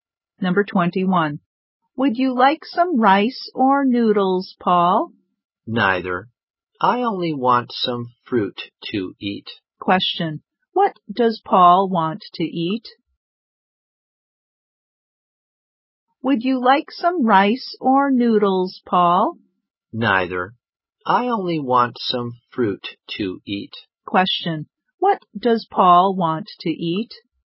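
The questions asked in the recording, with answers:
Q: What does Paul want to eat?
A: Some fruit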